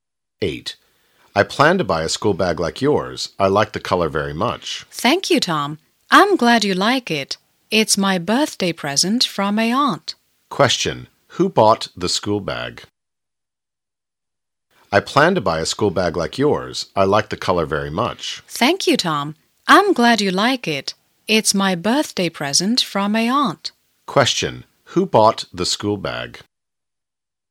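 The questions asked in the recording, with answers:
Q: who bought the school bag?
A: Her aunt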